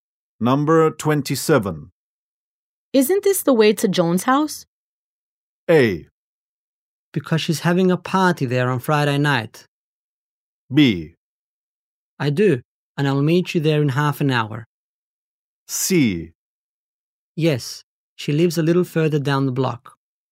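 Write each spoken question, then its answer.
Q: Isn't this the way to Joan's house?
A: C: Yes, she lives a little further down the block.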